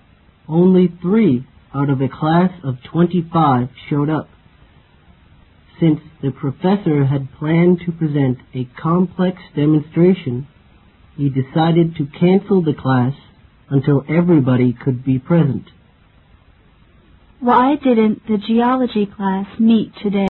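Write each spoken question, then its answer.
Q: Why didn't the geology class meet today?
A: Only 3 of the 25 students came, so the professor cancelled the class until everyone could be there.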